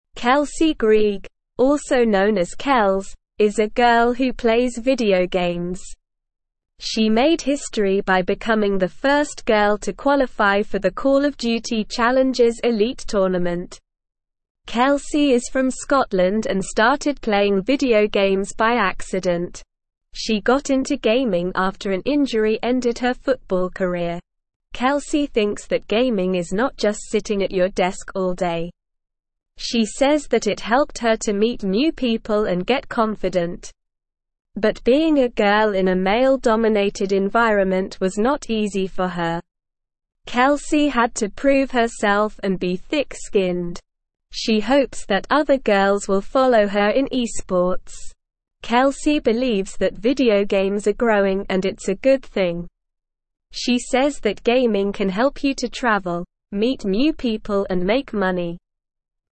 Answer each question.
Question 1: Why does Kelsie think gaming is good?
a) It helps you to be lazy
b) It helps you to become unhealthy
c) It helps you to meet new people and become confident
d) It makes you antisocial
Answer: It helps you to meet new people and become confident

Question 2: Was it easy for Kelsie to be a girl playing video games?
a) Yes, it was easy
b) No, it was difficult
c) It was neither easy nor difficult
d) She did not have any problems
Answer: No, it was difficult

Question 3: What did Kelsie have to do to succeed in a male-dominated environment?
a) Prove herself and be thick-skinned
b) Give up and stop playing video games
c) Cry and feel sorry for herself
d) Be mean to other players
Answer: Prove herself and be thick-skinned

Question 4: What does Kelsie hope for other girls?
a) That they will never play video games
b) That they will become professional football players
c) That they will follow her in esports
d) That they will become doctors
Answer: That they will follow her in esports

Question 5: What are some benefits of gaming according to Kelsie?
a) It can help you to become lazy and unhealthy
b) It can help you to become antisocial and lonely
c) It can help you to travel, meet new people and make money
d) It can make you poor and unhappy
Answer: It can help you to travel, meet new people and make money

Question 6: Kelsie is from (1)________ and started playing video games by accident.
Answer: Scotland

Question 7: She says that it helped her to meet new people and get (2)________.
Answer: confident

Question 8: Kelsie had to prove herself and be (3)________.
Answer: thick-skinned

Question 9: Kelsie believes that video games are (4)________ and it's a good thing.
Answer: growing

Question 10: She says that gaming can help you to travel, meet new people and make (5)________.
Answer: money

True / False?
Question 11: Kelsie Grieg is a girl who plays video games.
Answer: True

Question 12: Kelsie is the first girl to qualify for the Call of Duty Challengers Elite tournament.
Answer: True

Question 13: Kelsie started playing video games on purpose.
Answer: False

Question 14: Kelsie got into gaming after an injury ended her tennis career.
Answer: False

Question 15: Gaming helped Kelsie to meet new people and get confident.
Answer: True

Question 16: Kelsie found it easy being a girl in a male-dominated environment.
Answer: False

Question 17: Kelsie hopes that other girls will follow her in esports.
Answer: True

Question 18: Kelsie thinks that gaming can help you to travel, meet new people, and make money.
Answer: True

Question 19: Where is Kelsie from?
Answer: Kelsie is from Scotland.

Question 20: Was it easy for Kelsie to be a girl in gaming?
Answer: No, it wasn't easy for Kelsie to be a girl in gaming. She had to prove herself and be thick-skinned.

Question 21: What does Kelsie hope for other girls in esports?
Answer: Kelsie hopes that other girls will follow her in esports.

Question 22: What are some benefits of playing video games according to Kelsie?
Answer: According to Kelsie, playing video games can help you to travel, meet new people, and make money.

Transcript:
Kelsie Grieg, also known as Kels, is a girl who plays video games. She made history by becoming the first girl to qualify for the Call of Duty Challengers Elite tournament. Kelsie is from Scotland and started playing video games by accident. She got into gaming after an injury ended her football career. Kelsie thinks that gaming is not just sitting at your desk all day. She says that it helped her to meet new people and get confident. But being a girl in a male-dominated environment was not easy for her. Kelsie had to prove herself and be thick-skinned. She hopes that other girls will follow her in esports. Kelsie believes that video games are growing and it's a good thing. She says that gaming can help you to travel, meet new people and make money.

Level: Level 1

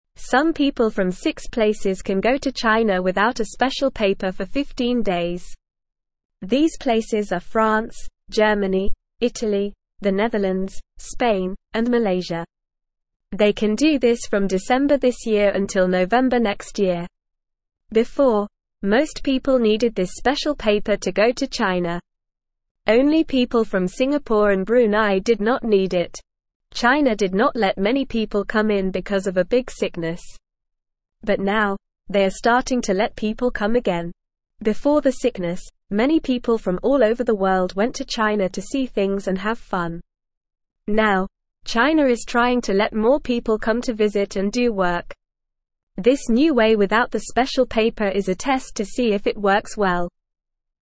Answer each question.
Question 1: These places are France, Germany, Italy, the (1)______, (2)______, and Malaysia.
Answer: Netherlands

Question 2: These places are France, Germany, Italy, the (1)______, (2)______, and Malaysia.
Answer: Spain

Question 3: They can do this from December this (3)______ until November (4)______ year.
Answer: next

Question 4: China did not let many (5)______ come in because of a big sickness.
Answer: people

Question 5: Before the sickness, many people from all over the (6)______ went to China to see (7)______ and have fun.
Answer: world

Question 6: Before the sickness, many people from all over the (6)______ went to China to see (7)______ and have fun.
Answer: things

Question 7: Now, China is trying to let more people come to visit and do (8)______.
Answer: work

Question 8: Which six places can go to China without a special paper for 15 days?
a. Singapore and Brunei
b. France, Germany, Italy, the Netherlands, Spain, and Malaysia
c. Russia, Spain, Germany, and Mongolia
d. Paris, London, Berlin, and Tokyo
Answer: France, Germany, Italy, the Netherlands, Spain, and Malaysia

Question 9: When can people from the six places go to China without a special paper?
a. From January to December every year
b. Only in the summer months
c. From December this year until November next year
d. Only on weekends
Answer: From December this year until November next year

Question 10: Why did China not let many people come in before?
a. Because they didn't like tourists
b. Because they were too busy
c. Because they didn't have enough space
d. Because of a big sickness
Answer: Because of a big sickness

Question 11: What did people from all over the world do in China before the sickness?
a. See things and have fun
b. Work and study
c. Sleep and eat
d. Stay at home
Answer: See things and have fun

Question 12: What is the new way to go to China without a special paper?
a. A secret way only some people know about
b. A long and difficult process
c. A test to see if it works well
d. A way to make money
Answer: A test to see if it works well

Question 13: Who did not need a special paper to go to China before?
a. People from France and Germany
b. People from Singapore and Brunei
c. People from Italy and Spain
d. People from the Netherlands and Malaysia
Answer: People from Singapore and Brunei

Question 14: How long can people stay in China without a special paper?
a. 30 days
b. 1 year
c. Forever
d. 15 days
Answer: 15 days

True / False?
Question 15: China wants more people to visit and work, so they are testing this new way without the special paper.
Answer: True

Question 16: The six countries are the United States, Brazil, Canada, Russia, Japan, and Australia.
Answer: False

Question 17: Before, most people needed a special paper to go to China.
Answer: True

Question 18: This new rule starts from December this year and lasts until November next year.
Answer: True

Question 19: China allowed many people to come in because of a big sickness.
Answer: False

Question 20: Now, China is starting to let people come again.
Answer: True

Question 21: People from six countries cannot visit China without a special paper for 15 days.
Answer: False

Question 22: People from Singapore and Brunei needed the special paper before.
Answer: False

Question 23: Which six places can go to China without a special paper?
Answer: France, Germany, Italy, the Netherlands, Spain, and Malaysia

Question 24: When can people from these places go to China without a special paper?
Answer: From December this year until November next year.

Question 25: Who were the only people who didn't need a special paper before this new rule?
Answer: People from Singapore and Brunei.

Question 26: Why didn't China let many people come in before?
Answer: Because of a big sickness.

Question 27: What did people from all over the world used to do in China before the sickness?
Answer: They used to go to China to see things and have fun.

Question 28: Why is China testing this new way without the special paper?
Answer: China is testing this new way to see if it works well.

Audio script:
Some people from six places can go to China without a special paper for 15 days. These places are France, Germany, Italy, the Netherlands, Spain, and Malaysia. They can do this from December this year until November next year. Before, most people needed this special paper to go to China. Only people from Singapore and Brunei did not need it.
China did not let many people come in because of a big sickness. But now, they are starting to let people come again. Before the sickness, many people from all over the world went to China to see things and have fun. Now, China is trying to let more people come to visit and do work. This new way without the special paper is a test to see if it works well.

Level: Level 1

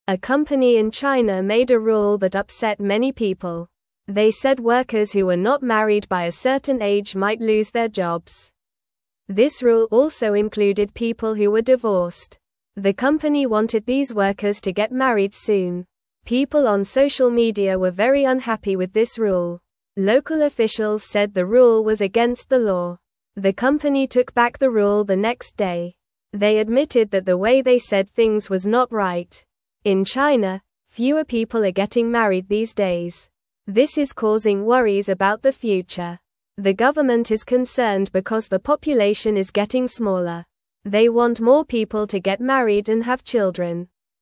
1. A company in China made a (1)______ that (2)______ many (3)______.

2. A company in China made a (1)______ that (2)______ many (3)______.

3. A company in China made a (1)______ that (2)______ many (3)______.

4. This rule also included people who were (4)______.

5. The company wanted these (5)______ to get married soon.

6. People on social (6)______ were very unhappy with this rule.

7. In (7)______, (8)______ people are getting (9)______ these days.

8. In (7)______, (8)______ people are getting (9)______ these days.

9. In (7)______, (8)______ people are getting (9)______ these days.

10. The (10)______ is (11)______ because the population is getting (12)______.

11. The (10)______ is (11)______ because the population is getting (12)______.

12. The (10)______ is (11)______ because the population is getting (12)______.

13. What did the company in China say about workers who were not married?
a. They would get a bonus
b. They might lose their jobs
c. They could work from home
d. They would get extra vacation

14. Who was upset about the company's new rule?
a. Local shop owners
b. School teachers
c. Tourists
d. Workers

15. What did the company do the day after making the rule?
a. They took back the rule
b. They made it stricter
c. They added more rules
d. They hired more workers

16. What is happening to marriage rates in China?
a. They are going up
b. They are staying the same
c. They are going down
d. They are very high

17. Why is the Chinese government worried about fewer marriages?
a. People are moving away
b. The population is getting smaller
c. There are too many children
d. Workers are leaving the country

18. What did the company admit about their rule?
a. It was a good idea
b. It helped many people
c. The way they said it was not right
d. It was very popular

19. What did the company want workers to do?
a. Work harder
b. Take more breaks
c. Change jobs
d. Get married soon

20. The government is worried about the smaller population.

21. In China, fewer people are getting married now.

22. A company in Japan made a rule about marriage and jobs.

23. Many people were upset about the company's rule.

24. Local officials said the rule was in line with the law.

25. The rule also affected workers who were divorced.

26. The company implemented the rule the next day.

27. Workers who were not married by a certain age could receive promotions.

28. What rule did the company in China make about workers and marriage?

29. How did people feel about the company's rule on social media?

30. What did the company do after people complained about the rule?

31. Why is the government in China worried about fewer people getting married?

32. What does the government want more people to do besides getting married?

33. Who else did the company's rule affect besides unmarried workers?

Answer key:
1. rule
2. upset
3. people
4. divorced
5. workers
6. media
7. China
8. fewer
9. married
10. government
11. concerned
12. smaller
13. They might lose their jobs
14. Workers
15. They took back the rule
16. They are going down
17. The population is getting smaller
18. The way they said it was not right
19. Get married soon
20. True
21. True
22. False
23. True
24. False
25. True
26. False
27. False
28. The company said workers who were not married by a certain age might lose their jobs.
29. People were very unhappy about the company's rule on social media.
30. The company took back the rule the next day.
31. The government is worried because the population is getting smaller.
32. The government wants more people to have children.
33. The rule also affected people who were divorced.

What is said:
A company in China made a rule that upset many people. They said workers who were not married by a certain age might lose their jobs. This rule also included people who were divorced. The company wanted these workers to get married soon.
People on social media were very unhappy with this rule. Local officials said the rule was against the law. The company took back the rule the next day. They admitted that the way they said things was not right.
In China, fewer people are getting married these days. This is causing worries about the future. The government is concerned because the population is getting smaller. They want more people to get married and have children.

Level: Level 2

